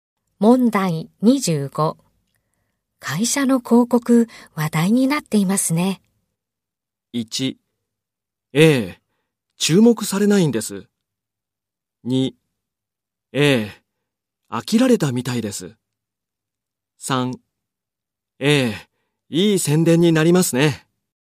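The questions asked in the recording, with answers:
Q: 会社の広告、話題になっていますね。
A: 3: ええ、いい宣伝になりますね。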